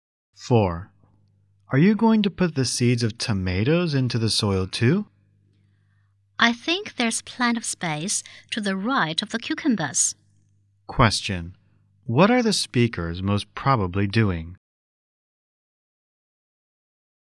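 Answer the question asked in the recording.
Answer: Planting vegetables in a garden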